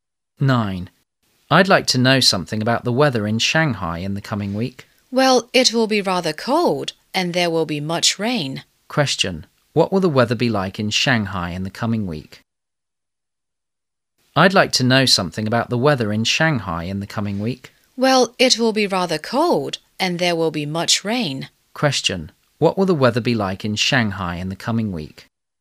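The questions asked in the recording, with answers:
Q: Question, what will the weather be like in Shanghai in the coming week?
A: Cold and rainy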